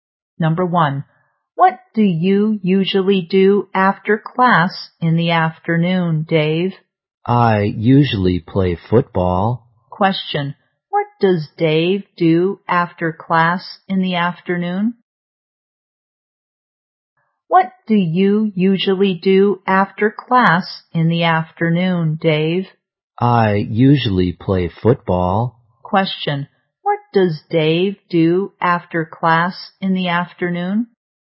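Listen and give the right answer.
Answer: He usually plays football.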